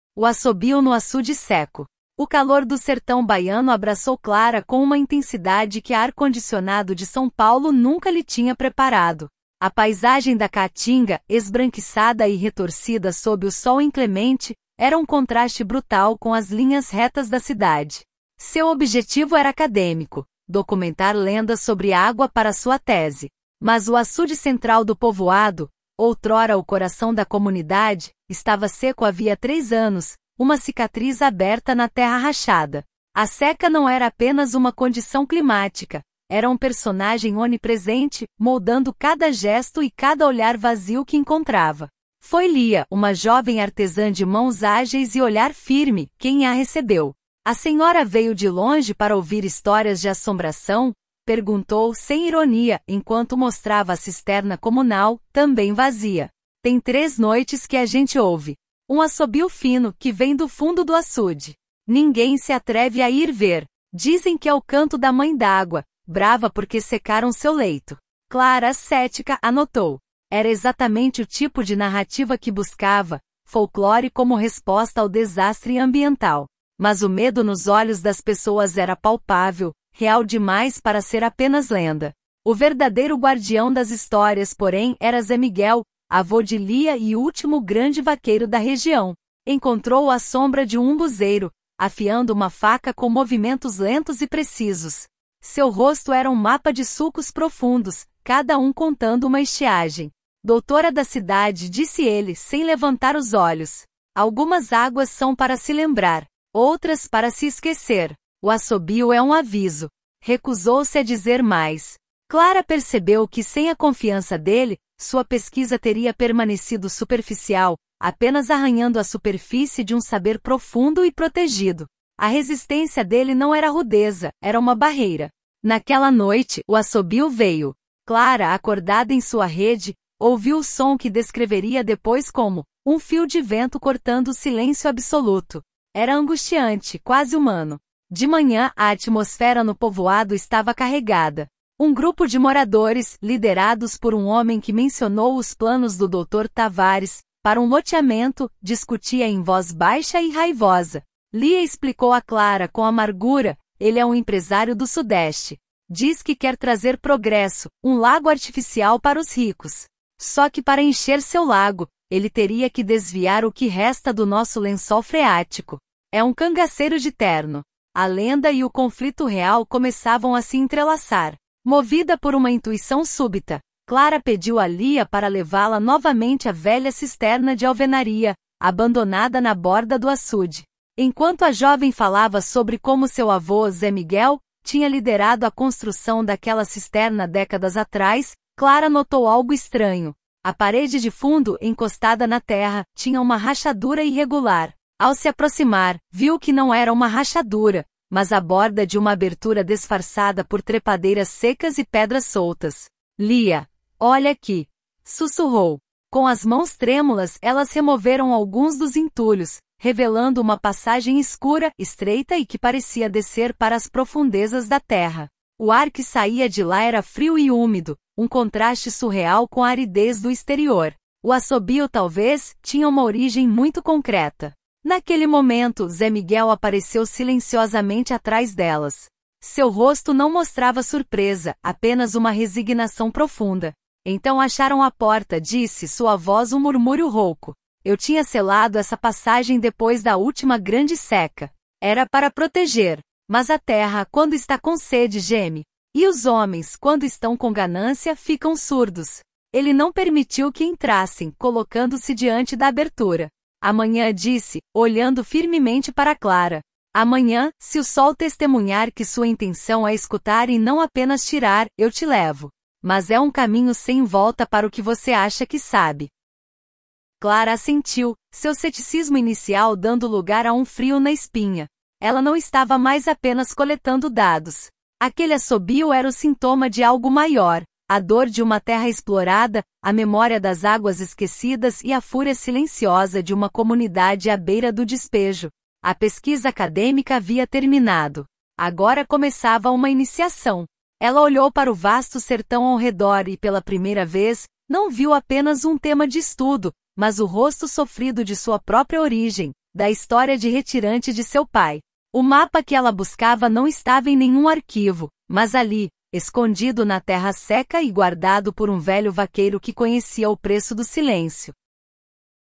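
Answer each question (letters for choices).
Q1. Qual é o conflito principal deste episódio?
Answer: O misterioso assobio noturno no açude seco, ligado à ameaça do empresário Dr. Tavares de desviar o lençol freático da comunidade.

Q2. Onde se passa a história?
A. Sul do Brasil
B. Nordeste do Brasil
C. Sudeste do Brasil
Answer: B

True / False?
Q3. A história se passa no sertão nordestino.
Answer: True

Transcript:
O Assobio no Açude Seco – TEST
O calor do sertão baiano abraçou Clara com uma intensidade que a ar-condicionado de São Paulo nunca lhe tinha preparado. A paisagem da caatinga, esbranquiçada e retorcida sob o sol inclemente, era um contraste brutal com as linhas retas da cidade. Seu objetivo era acadêmico: documentar lendas sobre água para sua tese. Mas o açude central do povoado, outrora o coração da comunidade, estava seco havia três anos, uma cicatriz aberta na terra rachada. 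A seca não era apenas uma condição climática; era um personagem onipresente, moldando cada gesto e cada olhar vazio que encontrava.
Foi Lia, uma jovem artesã de mãos ágeis e olhar firme, quem a recebeu. 'A senhora veio de longe para ouvir histórias de assombração?', perguntou, sem ironia, enquanto mostrava a cisterna comunal, também vazia. 'Tem três noites que a gente ouve. Um assobio fino, que vem do fundo do açude. Ninguém se atreve a ir ver. Dizem que é o canto da Mãe d'Água, brava porque secaram seu leito.' Clara, cética, anotou. Era exatamente o tipo de narrativa que buscava – folclore como resposta ao desastre ambiental. Mas o medo nos olhos das pessoas era palpável, real demais para ser apenas lenda.
O verdadeiro guardião das histórias, porém, era Zé Miguel, avô de Lia e último grande vaqueiro da região. Encontrou-o à sombra de um umbuzeiro, afiando uma faca com movimentos lentos e precisos. 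Seu rosto era um mapa de sulcos profundos, cada um contando uma estiagem. 'Doutora da cidade', disse ele, sem levantar os olhos. 'Algumas águas são para se lembrar. Outras, para se esquecer. O assobio é um aviso.' Recusou-se a dizer mais. Clara percebeu que, sem a confiança dele, sua pesquisa teria permanecido superficial, apenas arranhando a superfície de um saber profundo e protegido. A resistência dele não era rudeza, era uma barreira.
Naquela noite, o assobio veio. Clara, acordada em sua rede, ouviu o som que descreveria depois como 'um fio de vento cortando o silêncio absoluto'. Era angustiante, quase humano. De manhã, a atmosfera no povoado estava carregada. Um grupo de moradores, liderados por um homem que mencionou 'os planos do Dr. Tavares' para um loteamento, discutia em voz baixa e raivosa. Lia explicou a Clara, com amargura: 'Ele é um empresário do Sudeste. Diz que quer trazer progresso, um lago artificial para os ricos. 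Só que para encher seu lago, ele teria que desviar o que resta do nosso lençol freático. É um cangaceiro de terno.' A lenda e o conflito real começavam a se entrelaçar.
Movida por uma intuição súbita, Clara pediu a Lia para levá-la novamente à velha cisterna de alvenaria, abandonada na borda do açude. Enquanto a jovem falava sobre como seu avô, Zé Miguel, tinha liderado a construção daquela cisterna décadas atrás, Clara notou algo estranho. A parede de fundo, encostada na terra, tinha uma rachadura irregular. Ao se aproximar, viu que não era uma rachadura, mas a borda de uma abertura disfarçada por trepadeiras secas e pedras soltas. 'Lia... olha aqui.', sussurrou. Com as mãos trêmulas, elas removeram alguns dos entulhos, revelando uma passagem escura, estreita e que parecia descer para as profundezas da terra. O ar que saía de lá era frio e úmido, um contraste surreal com a aridez do exterior. 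O assobio, talvez, tinha uma origem muito concreta.
Naquele momento, Zé Miguel apareceu silenciosamente atrás delas. Seu rosto não mostrava surpresa, apenas uma resignação profunda. 'Então acharam a porta', disse, sua voz um murmúrio rouco. 'Eu tinha selado essa passagem depois da última grande seca. Era para proteger. Mas a terra, quando está com sede, geme. E os homens, quando estão com ganância, ficam surdos.' Ele não permitiu que entrassem, colocando-se diante da abertura. 'Amanhã', disse, olhando firmemente para Clara. 'Amanhã, se o sol testemunhar que sua intenção é escutar e não apenas tirar, eu te levo. Mas é um caminho sem volta para o que você acha que sabe.'
Clara assentiu, seu ceticismo inicial dando lugar a um frio na espinha. Ela não estava mais apenas coletando dados. Aquele assobio era o sintoma de algo maior: a dor de uma terra explorada, a memória das águas esquecidas e a fúria silenciosa de uma comunidade à beira do despejo. 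A pesquisa acadêmica havia terminado. Agora começava uma iniciação. Ela olhou para o vasto sertão ao redor e, pela primeira vez, não viu apenas um tema de estudo, mas o rosto sofrido de sua própria origem, da história de retirante de seu pai. O mapa que ela buscava não estava em nenhum arquivo, mas ali, escondido na terra seca e guardado por um velho vaqueiro que conhecia o preço do silêncio.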